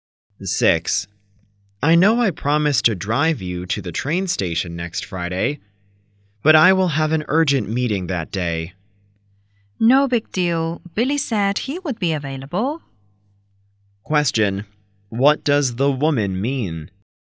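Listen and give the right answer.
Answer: It doesn't matter; Billy can drive her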